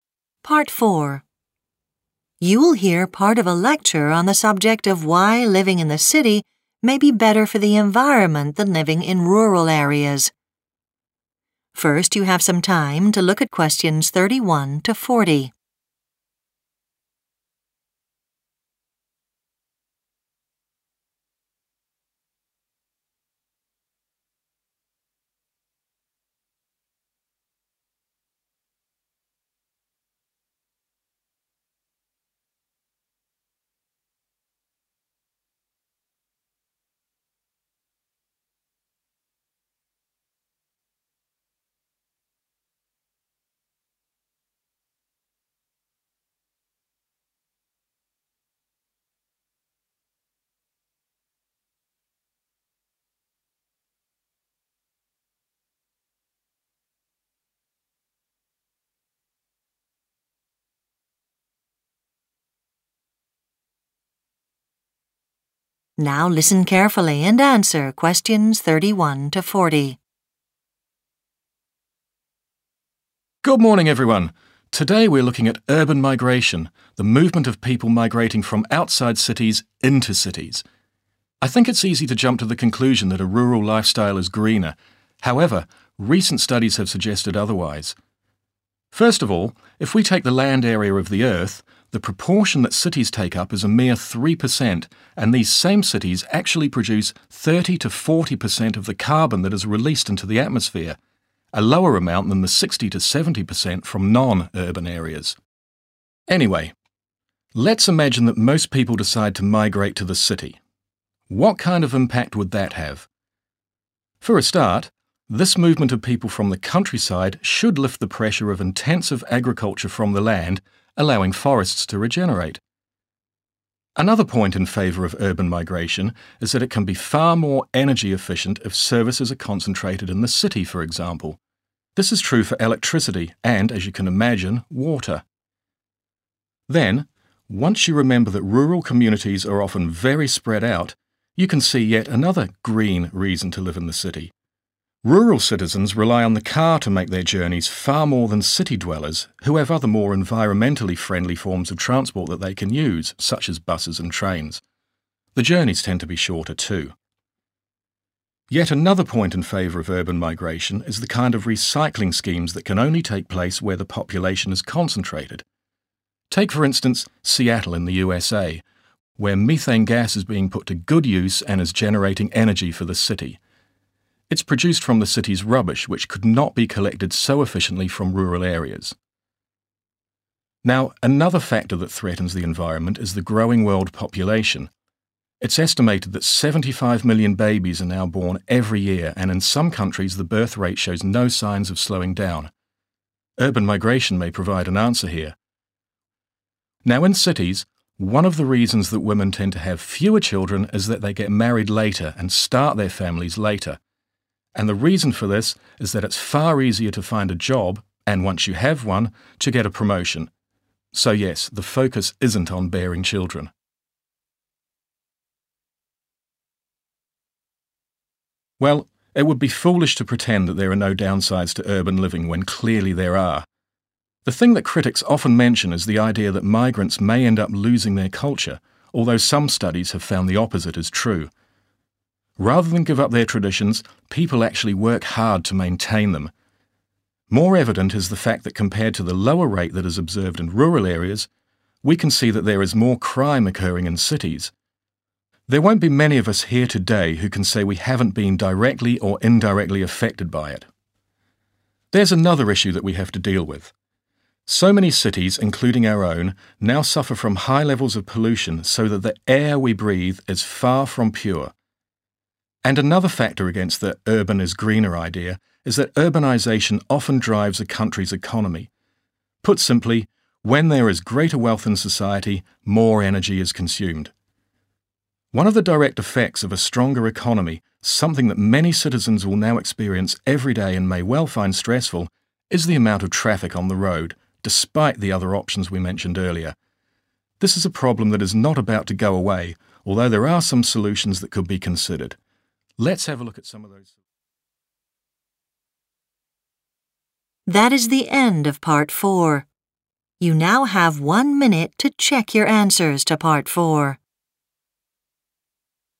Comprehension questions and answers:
Complete the notes below. Write ONE WORD ONLY for each answer.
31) produce less 31............. than non-urban areas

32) some 32............. would recover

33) 33............. in the city is more environmentally friendly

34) Recycling: energy could be generated from the methane gas from 34.............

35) are more likely to gain 35............. at work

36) possible loss of 36............. amongst some migrants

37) the higher 37............. rate among the population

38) the poor quality of the 38.............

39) Economic factors: increased 39............. in a population leads to more energy consumption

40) citizens may find the quantity of daily 40............. stressful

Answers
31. carbon
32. forests
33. transport
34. rubbish
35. promotion
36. culture
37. crime
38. air
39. wealth
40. traffic